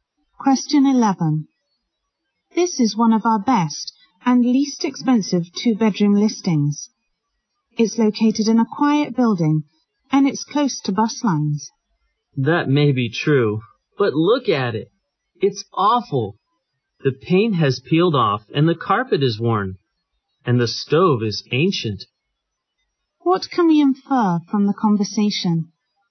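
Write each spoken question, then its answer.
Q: What can we infer from the conversation?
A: The woman doesn't like the apartment because it is in poor condition.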